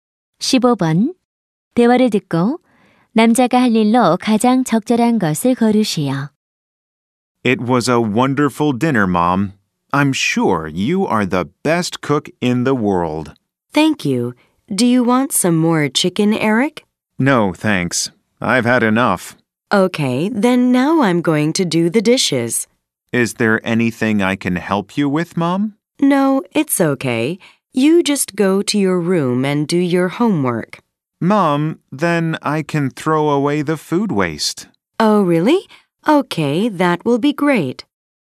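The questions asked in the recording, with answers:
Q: 15번 대화를 듣고 남자가 할 일로 가장 적절한 것을 고르시오.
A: 음식물 쓰레기 버리기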